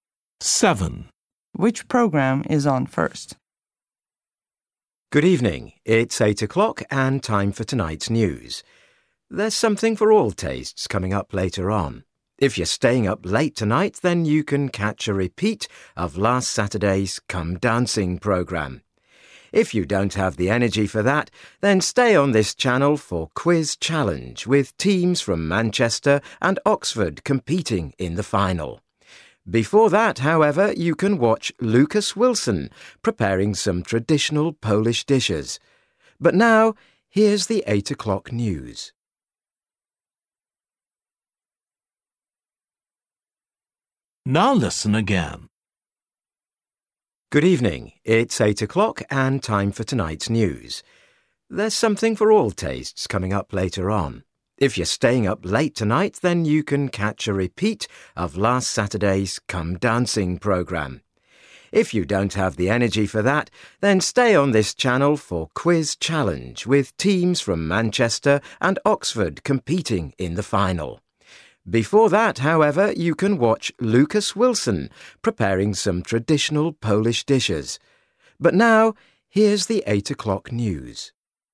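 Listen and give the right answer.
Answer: the cookery programme with Lucas Wilson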